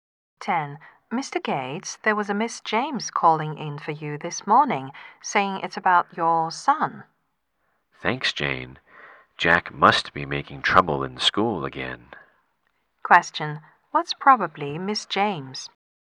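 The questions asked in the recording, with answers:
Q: What's probably Miss James?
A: Jack's teacher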